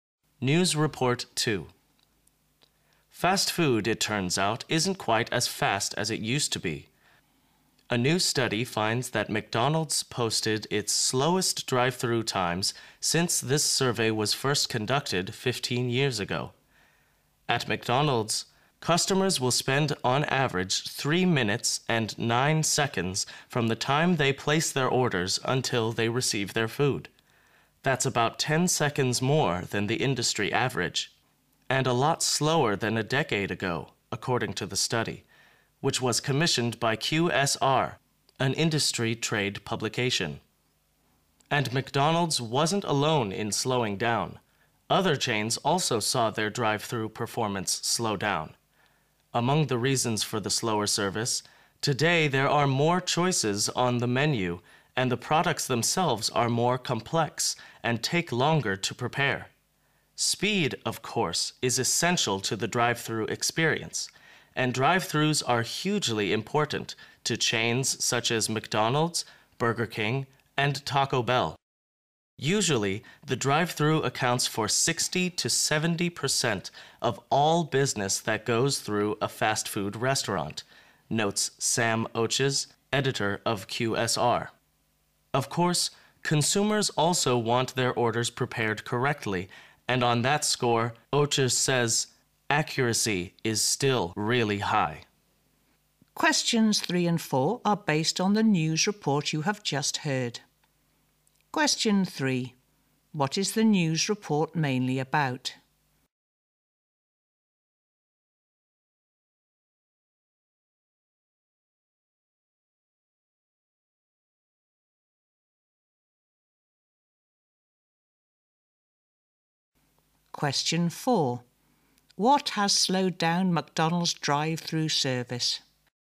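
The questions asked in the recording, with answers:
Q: What is the news report mainly about?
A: Fast food drive-through service is getting slower

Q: What has slowed down McDonald's drive-through service?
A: More menu choices and more complex products that take longer to prepare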